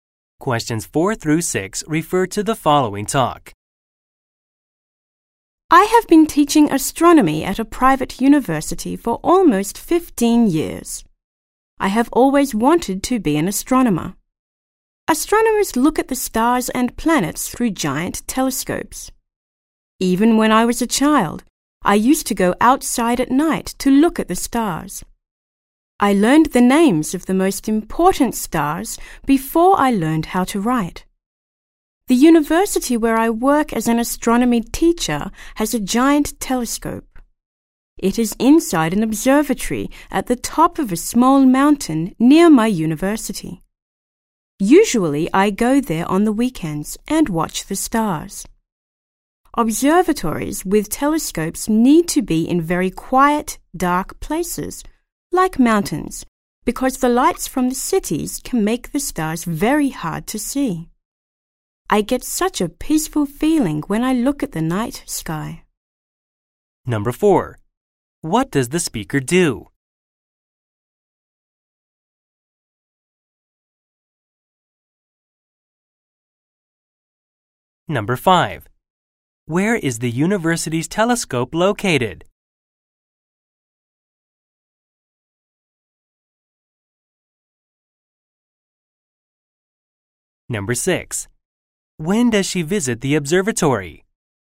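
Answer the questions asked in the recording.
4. She teaches astronomy at a private university
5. In an observatory at the top of a small mountain near the university
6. Usually on the weekends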